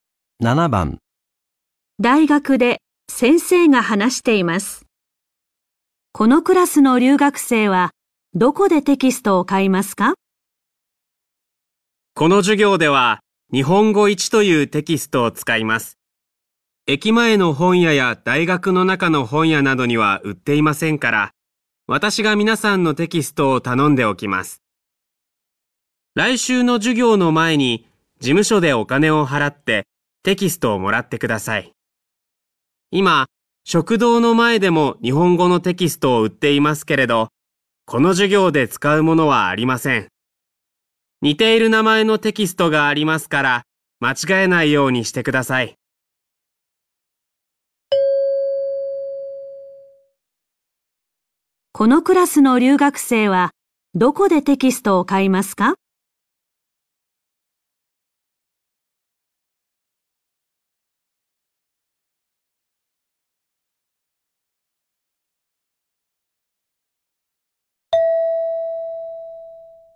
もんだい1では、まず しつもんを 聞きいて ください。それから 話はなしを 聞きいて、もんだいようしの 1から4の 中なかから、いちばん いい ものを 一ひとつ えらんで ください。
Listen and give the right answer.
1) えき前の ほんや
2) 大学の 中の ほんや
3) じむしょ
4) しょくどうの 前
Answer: 3) じむしょ

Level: N4 Listening · Test 1